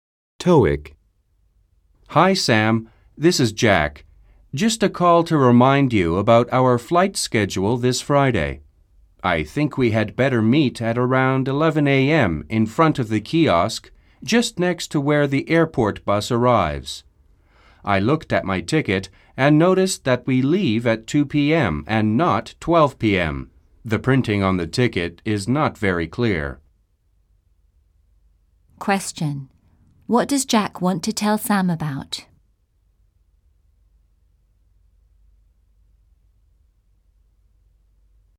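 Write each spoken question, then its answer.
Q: What does Jack want to tell Sam about?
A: Their flight schedule: where and when to meet, and that the flight leaves at 2 p.m., not 12 p.m.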